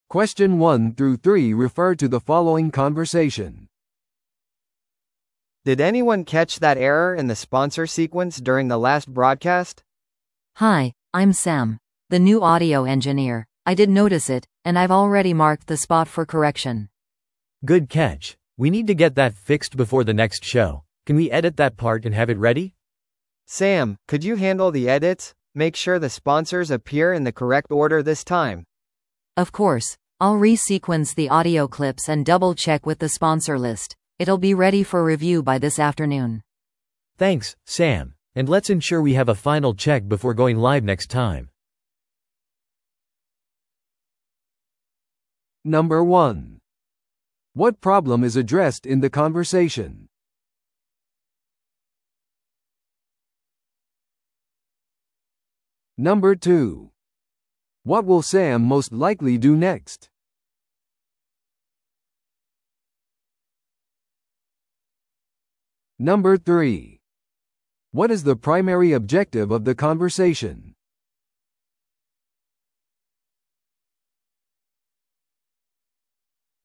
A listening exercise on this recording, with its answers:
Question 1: What problem is addressed in the conversation?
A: スポンサーの言及順が間違っていた。

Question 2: What will Sam most likely do next?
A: スポンサーの順番を編集してリストと照らし合わせる。

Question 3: What is the primary objective of the conversation?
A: ラジオ番組の再生エラーを修正する。

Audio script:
A: Did anyone catch that error in the sponsor sequence during the last broadcast?
B: Hi, I'm Sam — the new audio engineer. I did notice it, and I've already marked the spot for correction.
C: Good catch. We need to get that fixed before the next show. Can we edit that part and have it ready?
A: Sam, could you handle the edits? Make sure the sponsors appear in the correct order this time.
B: Of course. I'll re-sequence the audio clips and double-check with the sponsor list. It'll be ready for review by this afternoon.
C: Thanks, Sam. And let's ensure we have a final check before going live next time.